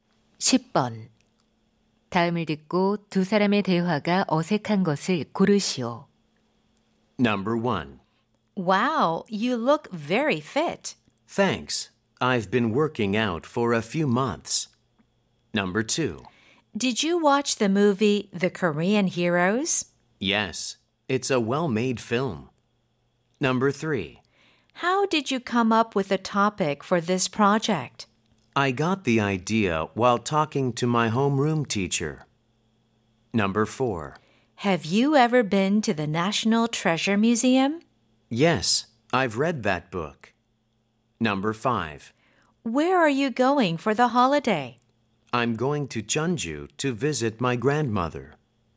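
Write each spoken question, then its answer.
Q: 다음을 듣고 두 사람의 대화가 어색한 것을 고르시오.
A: 4: Have you ever been to the National Treasure Museum? / Yes, I've read that book.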